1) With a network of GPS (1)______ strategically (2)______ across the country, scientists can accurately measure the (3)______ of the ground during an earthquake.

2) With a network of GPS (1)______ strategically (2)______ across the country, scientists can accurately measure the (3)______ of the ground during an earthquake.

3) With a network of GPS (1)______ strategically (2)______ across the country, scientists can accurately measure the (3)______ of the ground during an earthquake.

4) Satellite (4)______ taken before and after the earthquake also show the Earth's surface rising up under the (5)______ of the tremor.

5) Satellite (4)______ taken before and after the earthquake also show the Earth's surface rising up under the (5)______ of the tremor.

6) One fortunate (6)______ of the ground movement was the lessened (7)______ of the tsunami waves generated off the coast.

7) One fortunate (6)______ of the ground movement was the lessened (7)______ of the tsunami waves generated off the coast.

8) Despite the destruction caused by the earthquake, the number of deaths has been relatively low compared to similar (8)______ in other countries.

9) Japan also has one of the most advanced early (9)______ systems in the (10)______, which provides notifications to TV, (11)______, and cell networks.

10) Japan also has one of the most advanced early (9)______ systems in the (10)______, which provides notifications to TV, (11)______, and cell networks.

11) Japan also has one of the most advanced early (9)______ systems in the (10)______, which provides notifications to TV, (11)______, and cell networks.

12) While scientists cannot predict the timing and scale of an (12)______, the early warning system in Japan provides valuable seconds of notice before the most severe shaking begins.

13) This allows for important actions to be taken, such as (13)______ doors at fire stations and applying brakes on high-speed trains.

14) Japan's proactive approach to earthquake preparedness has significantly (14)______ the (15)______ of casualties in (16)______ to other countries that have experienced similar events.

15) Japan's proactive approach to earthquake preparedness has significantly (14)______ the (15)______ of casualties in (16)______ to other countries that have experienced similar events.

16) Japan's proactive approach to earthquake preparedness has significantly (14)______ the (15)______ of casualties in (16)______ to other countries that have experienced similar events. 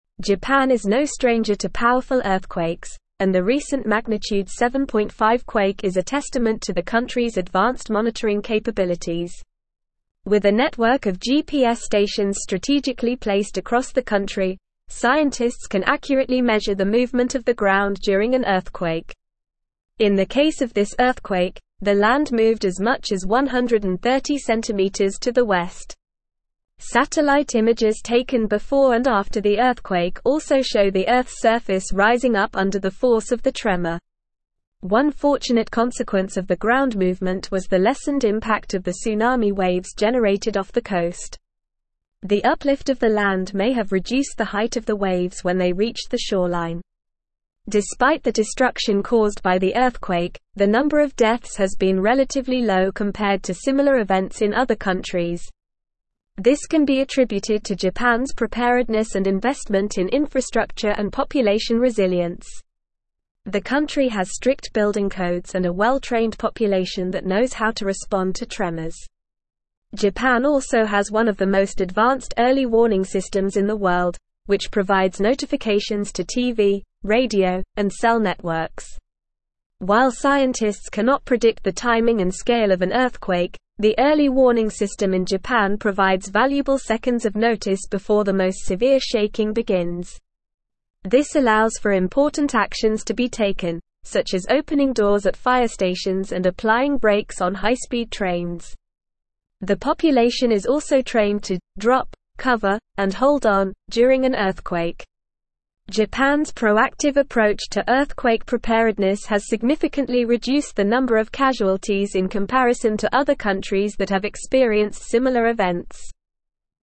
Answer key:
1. stations
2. placed
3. movement
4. images
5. force
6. consequence
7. impact
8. events
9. warning
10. world
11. radio
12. earthquake
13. opening
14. reduced
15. number
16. comparison

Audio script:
Japan is no stranger to powerful earthquakes, and the recent magnitude 7.5 quake is a testament to the country's advanced monitoring capabilities. With a network of GPS stations strategically placed across the country, scientists can accurately measure the movement of the ground during an earthquake. In the case of this earthquake, the land moved as much as 130cm to the west. Satellite images taken before and after the earthquake also show the Earth's surface rising up under the force of the tremor.
One fortunate consequence of the ground movement was the lessened impact of the tsunami waves generated off the coast. The uplift of the land may have reduced the height of the waves when they reached the shoreline. Despite the destruction caused by the earthquake, the number of deaths has been relatively low compared to similar events in other countries. This can be attributed to Japan's preparedness and investment in infrastructure and population resilience. The country has strict building codes and a well-trained population that knows how to respond to tremors. Japan also has one of the most advanced early warning systems in the world, which provides notifications to TV, radio, and cell networks.
While scientists cannot predict the timing and scale of an earthquake, the early warning system in Japan provides valuable seconds of notice before the most severe shaking begins. This allows for important actions to be taken, such as opening doors at fire stations and applying brakes on high-speed trains. The population is also trained to "drop, cover, and hold on" during an earthquake. Japan's proactive approach to earthquake preparedness has significantly reduced the number of casualties in comparison to other countries that have experienced similar events.

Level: Level 4